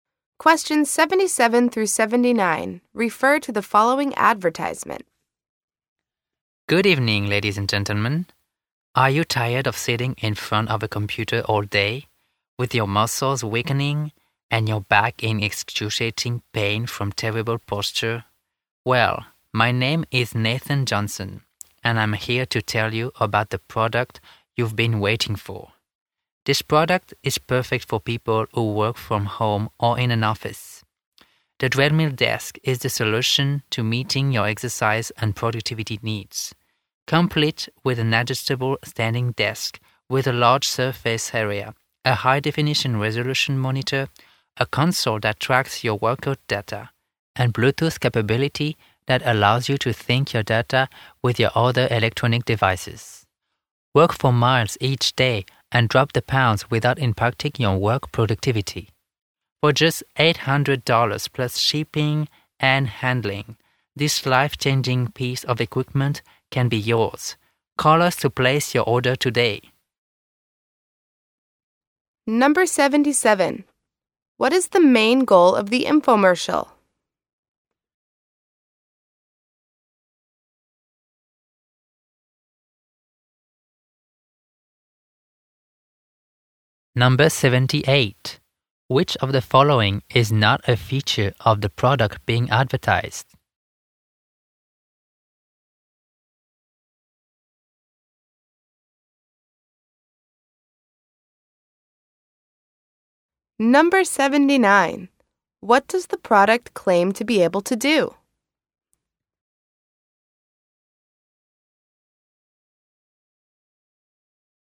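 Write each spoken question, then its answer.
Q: What is the main goal of the infomercial?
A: To sell a treadmill desk

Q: What does the product claim to be able to do?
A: Help you lose weight without hurting your work productivity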